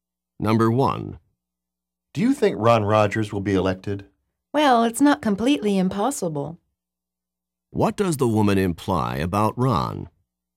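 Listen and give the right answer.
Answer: It's possible he will be elected.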